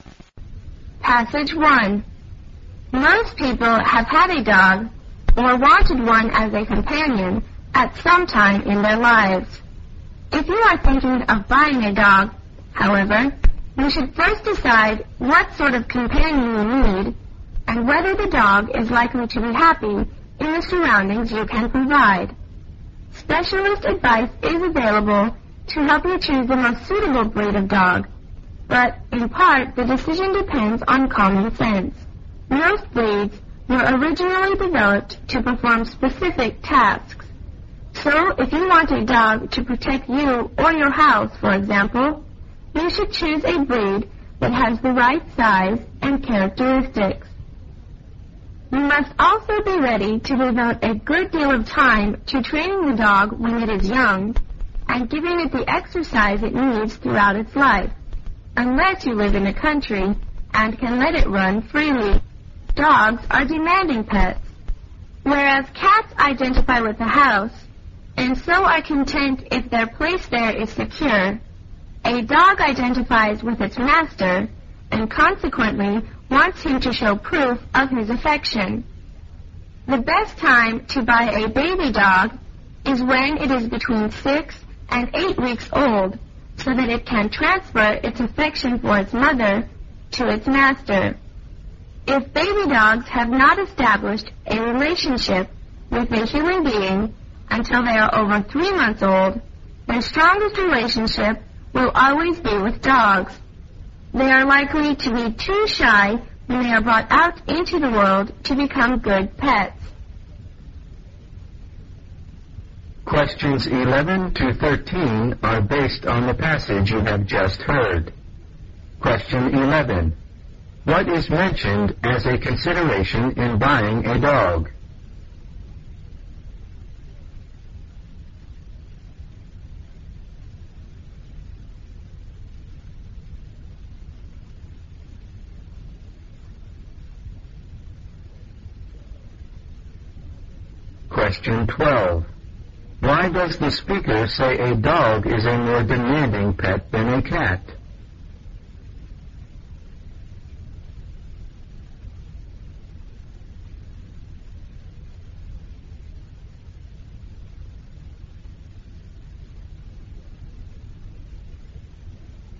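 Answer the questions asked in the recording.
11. What sort of companion you need and whether the dog will be happy in your surroundings
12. A dog identifies with its master and wants proof of his affection
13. So they form a relationship with humans and become good pets rather than too shy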